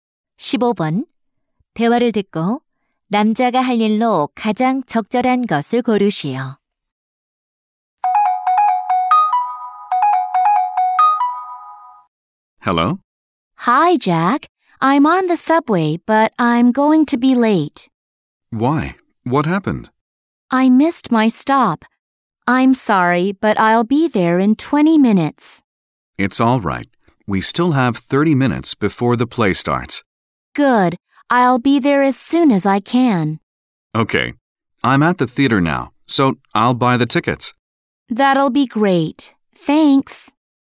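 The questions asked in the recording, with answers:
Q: 대화를 듣고 남자가 할 일로 가장 적절한 것을 고르시오.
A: 연극 표 구입하기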